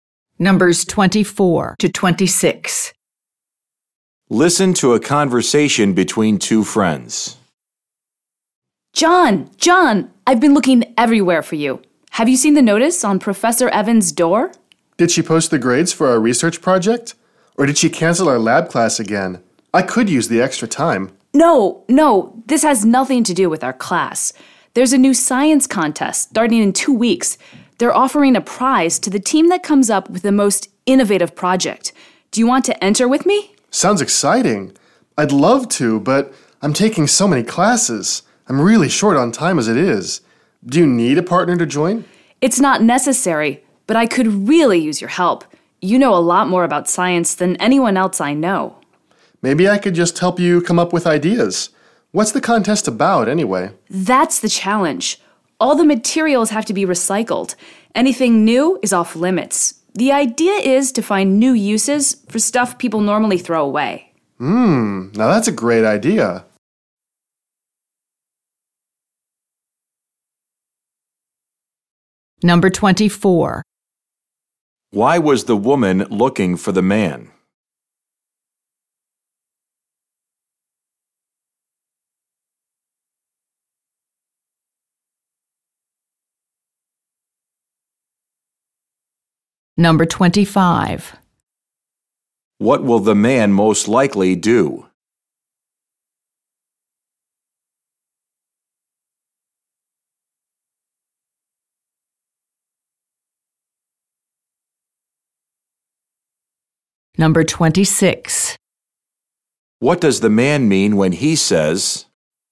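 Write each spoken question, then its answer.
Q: Why was the woman looking for the man?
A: To ask him to enter a science contest with her

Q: What will the man most likely do?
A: Help her come up with ideas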